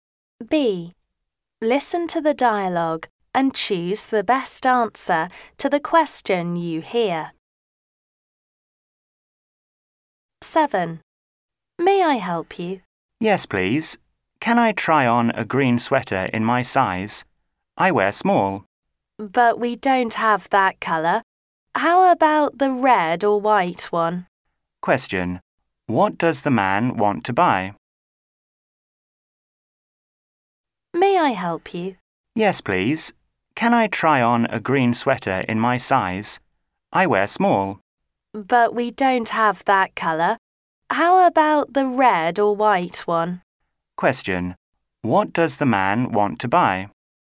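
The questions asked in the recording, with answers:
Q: What does the man want to buy?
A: A green sweater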